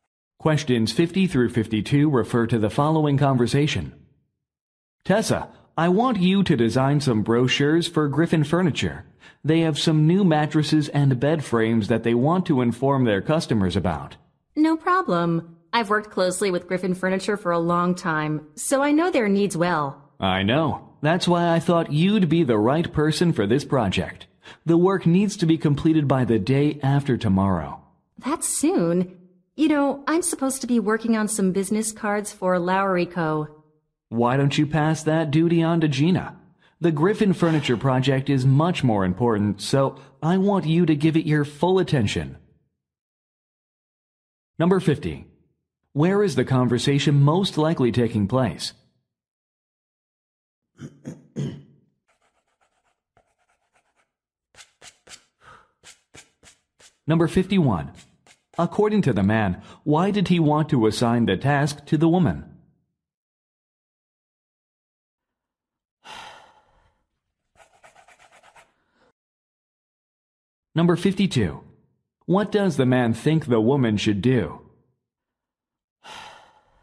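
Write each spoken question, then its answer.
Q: According to the man, why did he want to assign the task to the woman?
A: She has worked closely with Griffin Furniture for a long time

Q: What does the man think the woman should do?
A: Pass the Lowry Co. business cards to Gina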